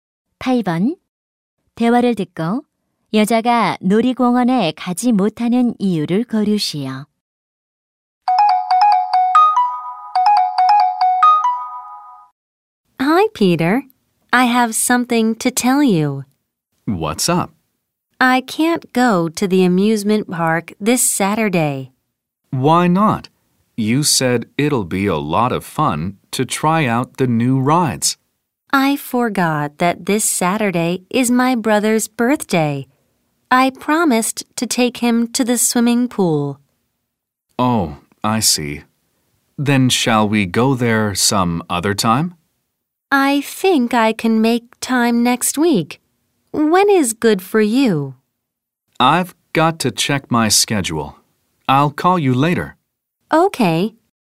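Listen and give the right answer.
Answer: 남동생 생일이라 수영장에 데려가기로 해서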